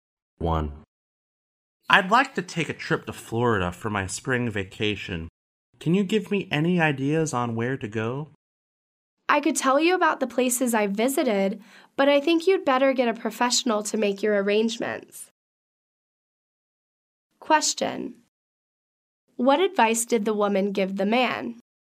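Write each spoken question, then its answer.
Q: What advice did the woman give the man?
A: To get a travel agent (a professional) to make his arrangements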